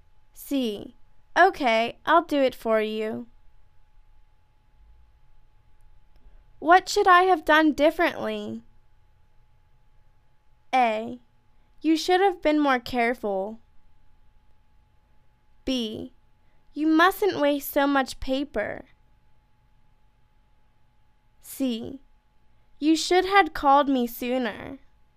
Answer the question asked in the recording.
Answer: You should've been more careful.